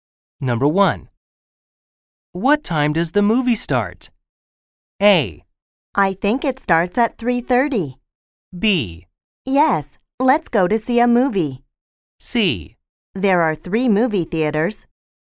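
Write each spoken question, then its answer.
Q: What time does the movie start?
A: A: I think it starts at 3:30.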